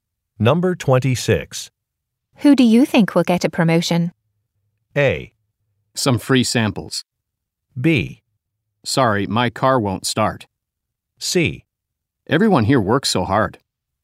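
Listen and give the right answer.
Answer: C: Everyone here works so hard.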